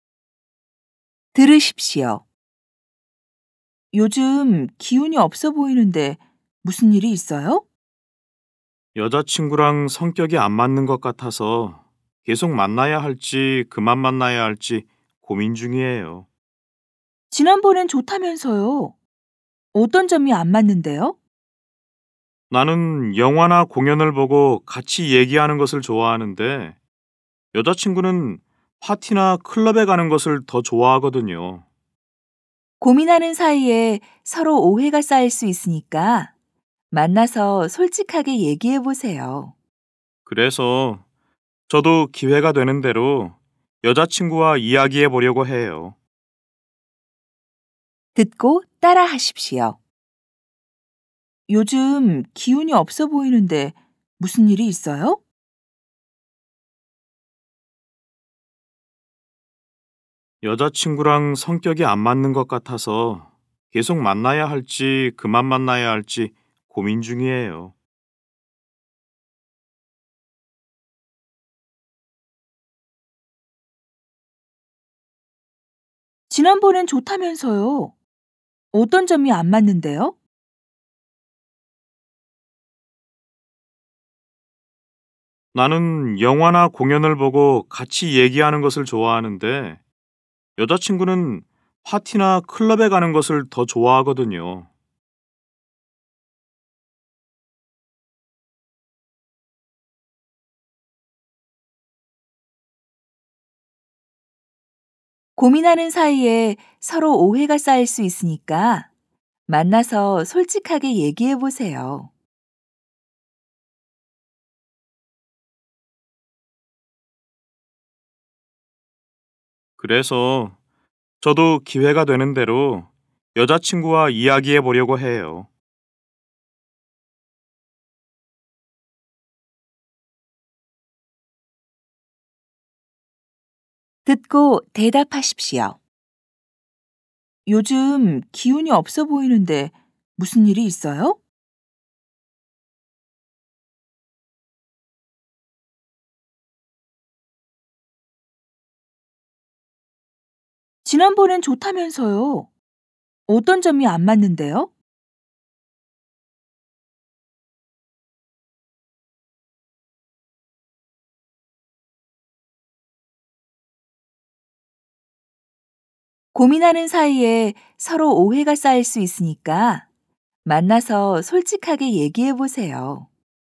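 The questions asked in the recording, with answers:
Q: 요즘 기운이 없어 보이는데 무슨 일이 있어요?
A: 여자친구랑 성격이 안 맞는 것 같아서 계속 만나야 할지 고민 중이에요.

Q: 지난번엔 좋다면서요. 어떤 점이 안 맞는데요?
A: 나는 영화나 공연을 보고 얘기하는 것을 좋아하는데 여자친구는 파티나 클럽에 가는 것을 더 좋아해요.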